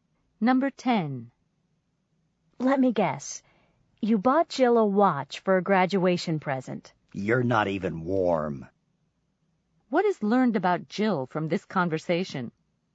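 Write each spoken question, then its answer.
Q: What is learned about Jill from this conversation?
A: She didn't get a watch; the guess is far off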